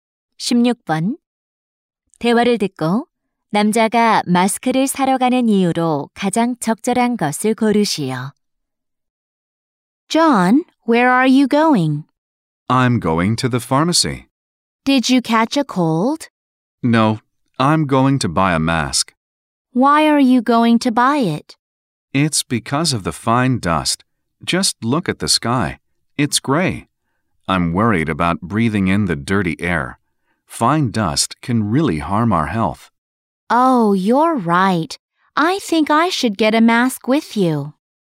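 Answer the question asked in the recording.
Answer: 미세먼지 때문에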